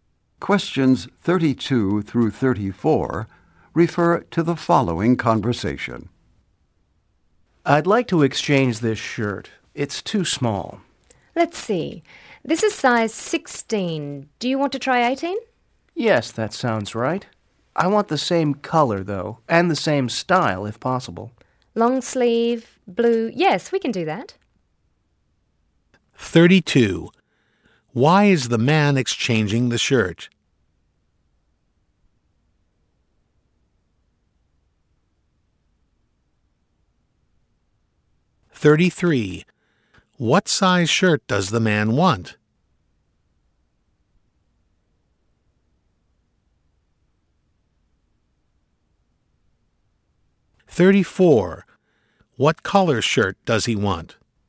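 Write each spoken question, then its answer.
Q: Why is the man exchanging the shirt?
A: It's too small

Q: What size shirt does the man want?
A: 18

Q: What color shirt does he want?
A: Blue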